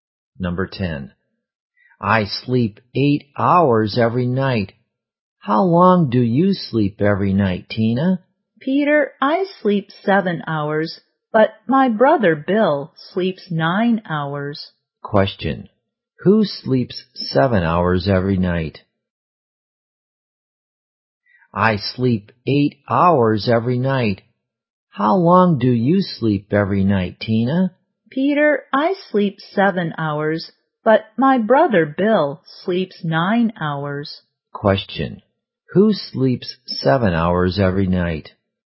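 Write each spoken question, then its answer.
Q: Who sleeps 7 hours every night?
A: Tina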